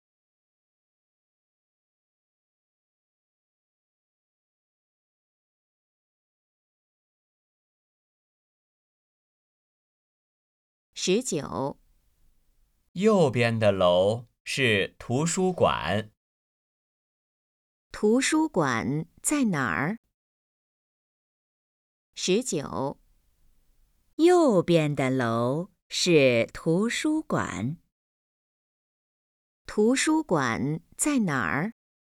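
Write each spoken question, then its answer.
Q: 图书馆在哪儿?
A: 右边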